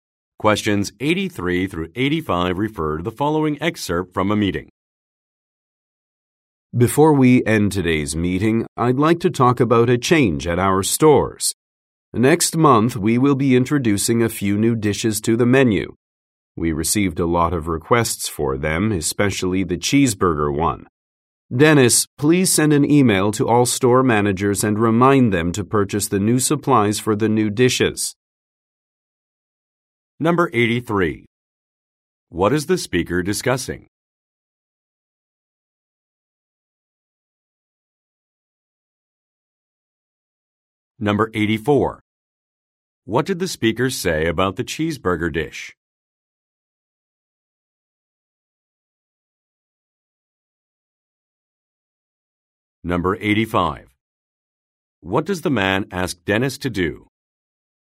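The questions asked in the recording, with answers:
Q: What is the speaker discussing?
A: New menu dishes

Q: What did the speaker say about the cheeseburger dish?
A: It was requested a lot

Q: What does the man ask Dennis to do?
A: Email store managers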